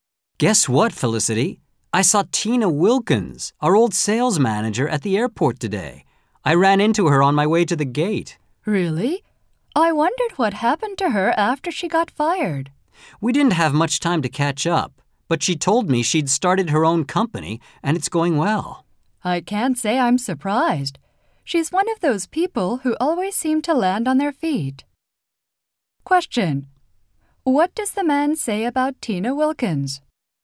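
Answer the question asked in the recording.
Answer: She started her own company, and it is going well.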